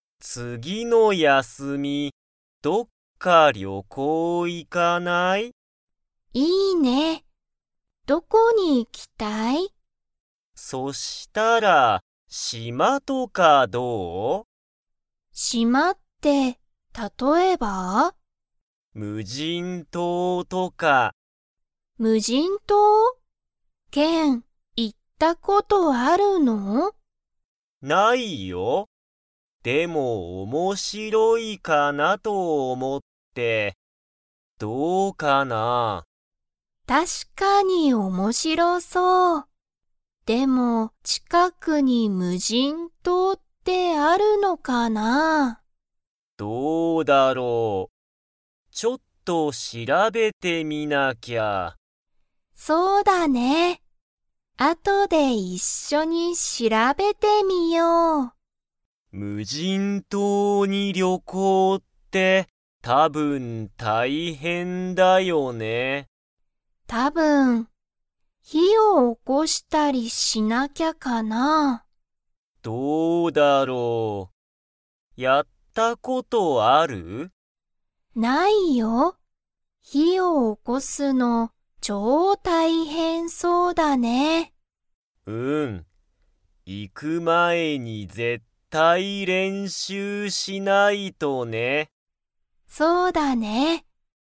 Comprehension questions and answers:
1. ケンは、無人むじん島とうに行いったことがありますか?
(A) はい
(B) いいえ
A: いいえ

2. 二人ふたりは、 練習れんしゅうをする。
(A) 無人むじん島とうについて調しらべる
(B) 魚さかなを食たべる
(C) 火ひを起おこす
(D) 島しまに住すむ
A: 火ひを起おこす

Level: Level 3

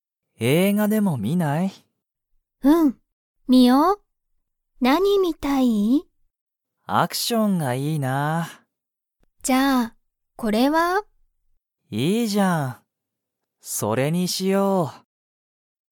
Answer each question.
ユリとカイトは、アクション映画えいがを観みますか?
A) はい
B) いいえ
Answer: はい

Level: Level 1

